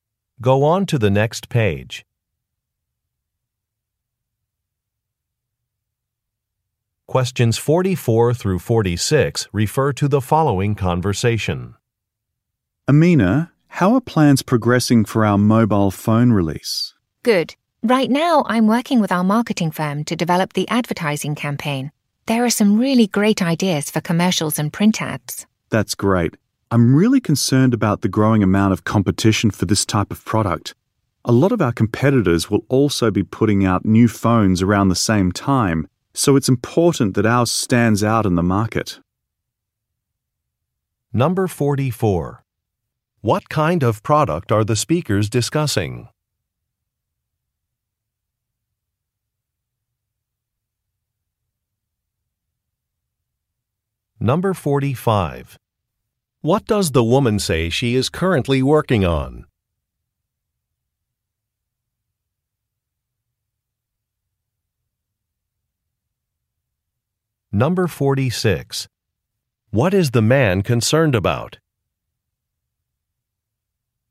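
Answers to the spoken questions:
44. A mobile phone
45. An advertising campaign
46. Growing competition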